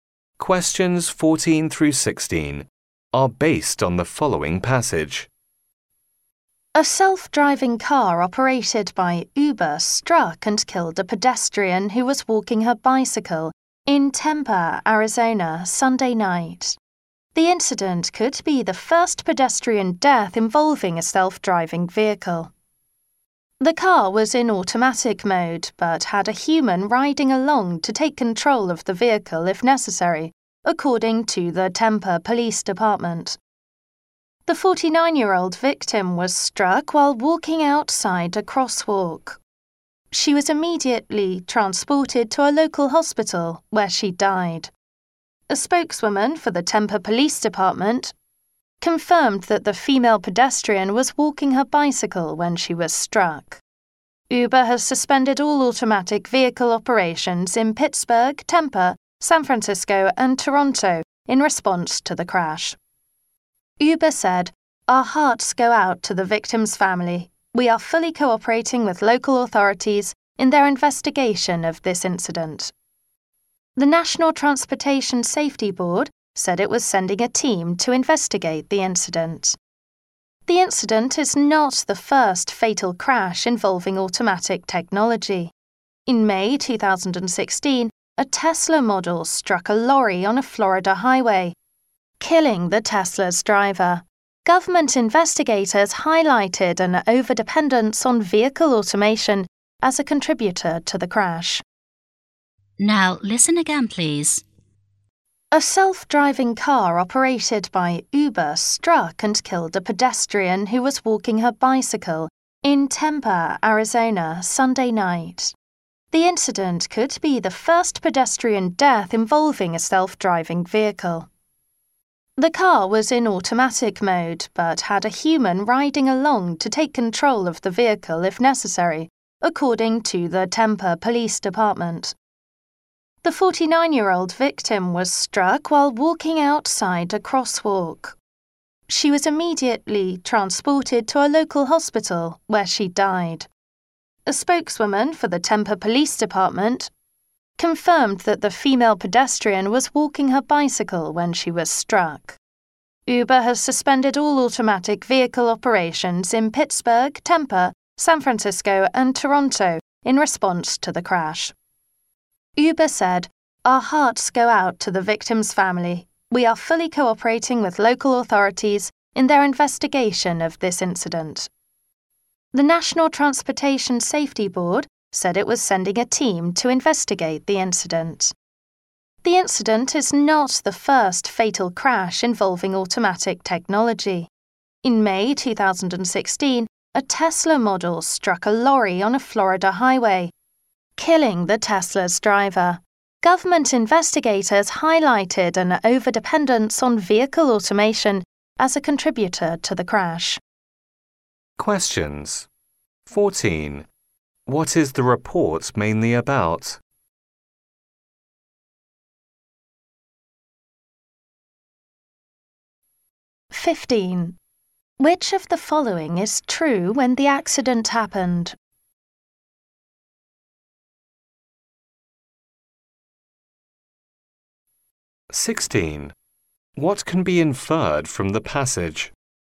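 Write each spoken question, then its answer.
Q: What is the report mainly about?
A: A self-driving Uber car killing a pedestrian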